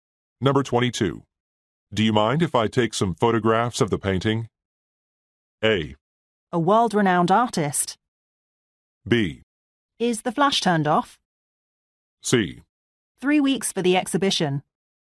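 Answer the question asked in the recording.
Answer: B: Is the flash turned off?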